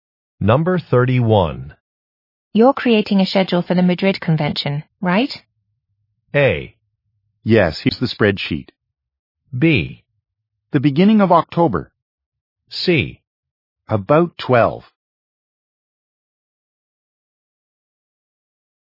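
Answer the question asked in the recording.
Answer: A: Yes, here's the spreadsheet.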